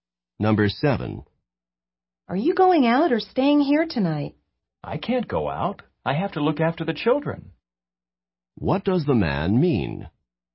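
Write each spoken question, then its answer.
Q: What does the man mean?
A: He has to stay home and take care of the children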